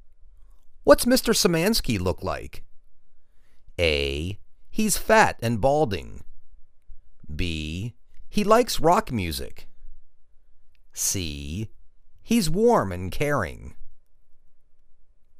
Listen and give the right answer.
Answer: He's fat and balding.